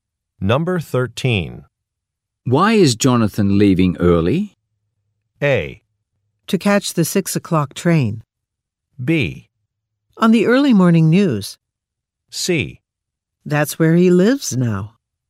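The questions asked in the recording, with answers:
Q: Why is Jonathan leaving early?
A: A: To catch the 6 o'clock train.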